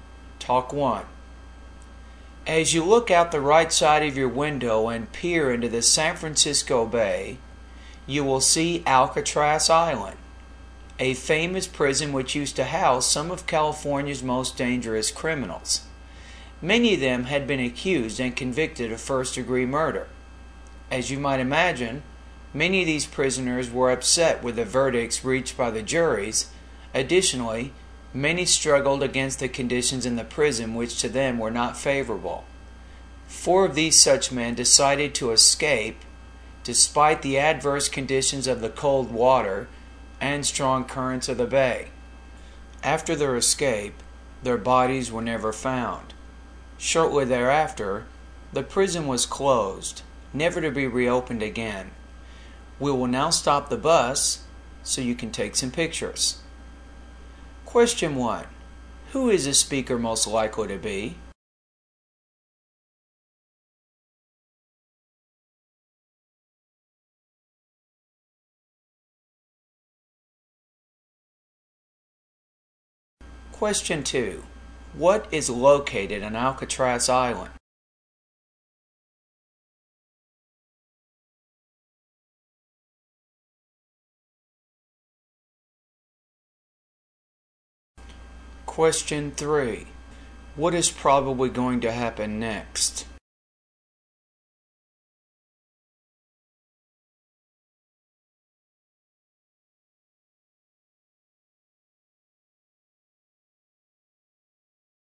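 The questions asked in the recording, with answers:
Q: Who is the speaker most likely to be?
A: A tour guide

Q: What is located on Alcatraz Island?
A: A famous prison

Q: What is probably going to happen next?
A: The bus will stop so people can take pictures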